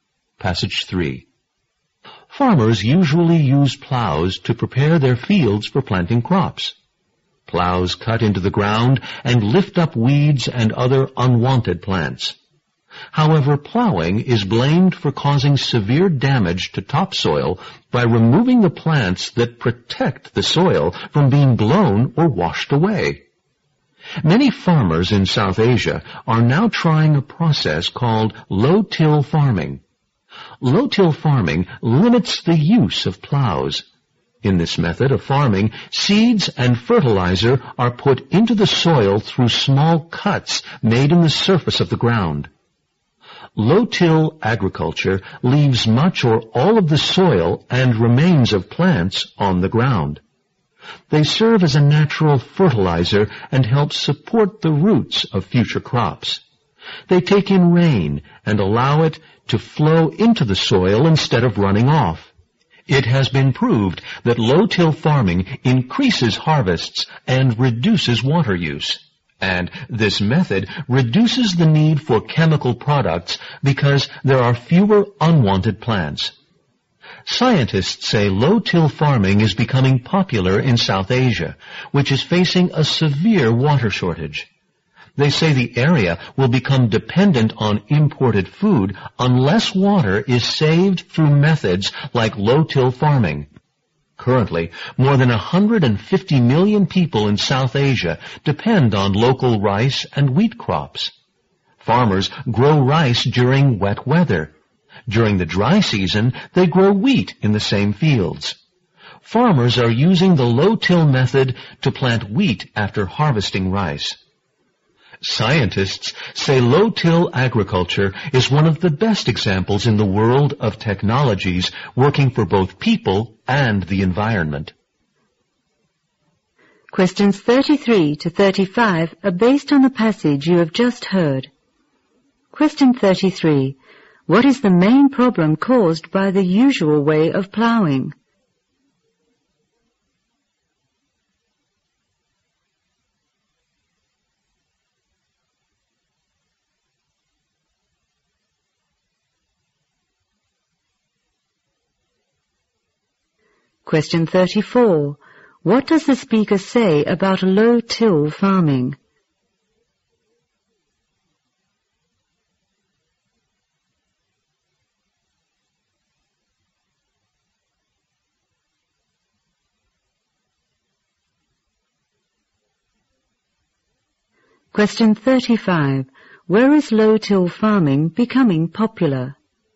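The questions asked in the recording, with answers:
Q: What is the main problem caused by the usual way of plowing?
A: It causes severe damage to topsoil by removing the plants that protect it

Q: Where is low-till farming becoming popular?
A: In South Asia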